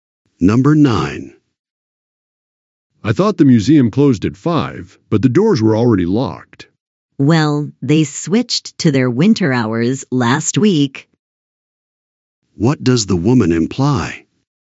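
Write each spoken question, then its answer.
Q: What does the woman imply?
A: The museum now closes earlier because of winter hours.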